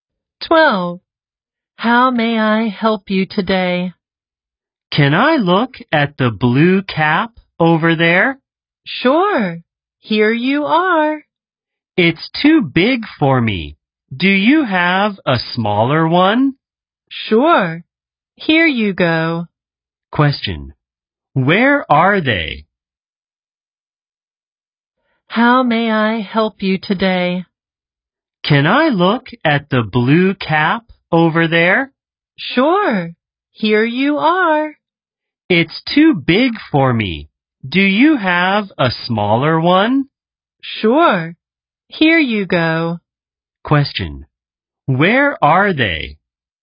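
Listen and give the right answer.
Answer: In a store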